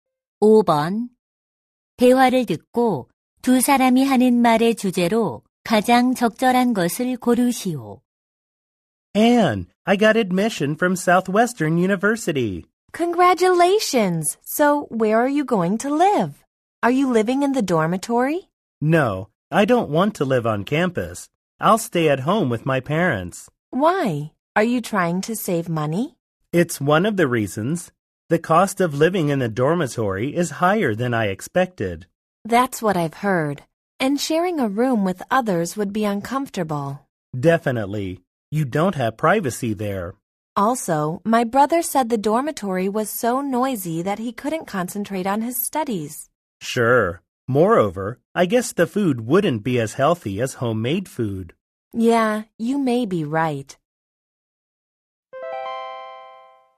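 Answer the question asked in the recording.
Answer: 기숙사 생활의 단점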